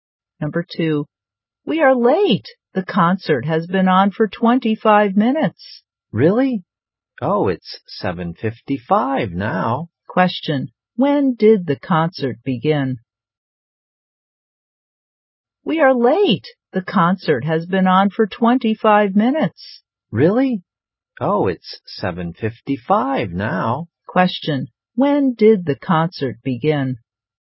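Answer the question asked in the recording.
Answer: At 7:30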